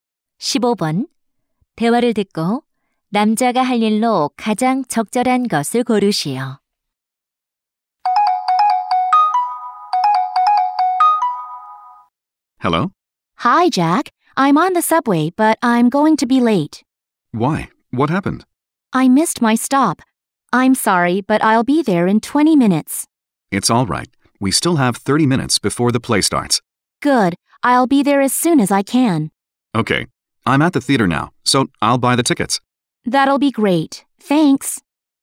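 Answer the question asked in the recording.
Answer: 연극 표 사기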